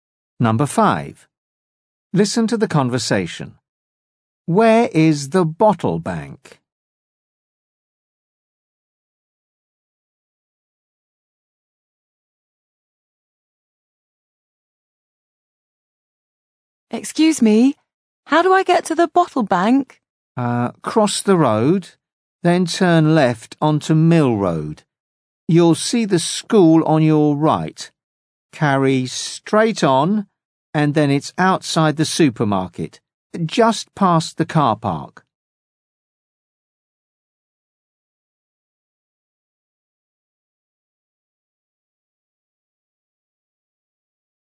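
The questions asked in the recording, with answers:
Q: Where is the bottle bank?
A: Outside the supermarket, just past the car park.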